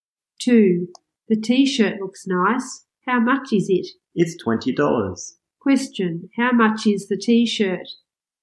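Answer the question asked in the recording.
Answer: $20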